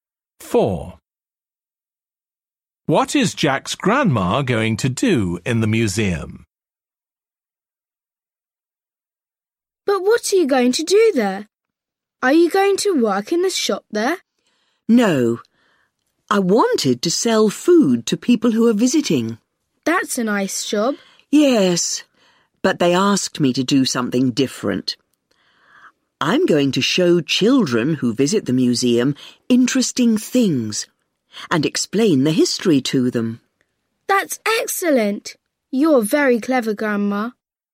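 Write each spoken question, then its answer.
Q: What is Jack's grandma going to do in the museum?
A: show children things and explain history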